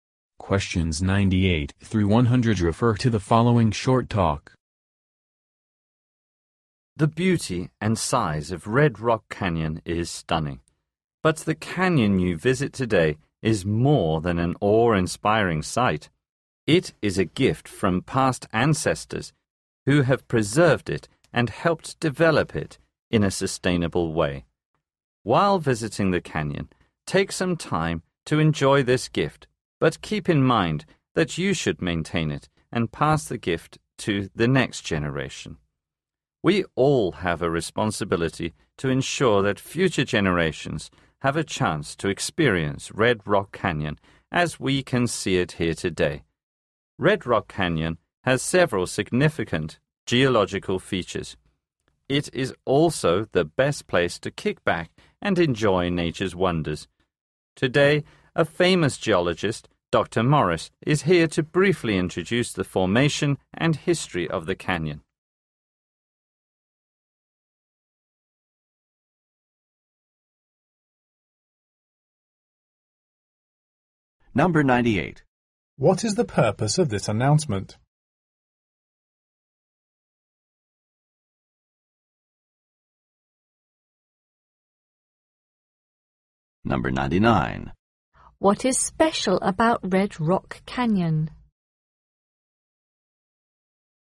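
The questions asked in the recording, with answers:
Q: What is special about Red Rock Canyon?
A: It has several significant geological features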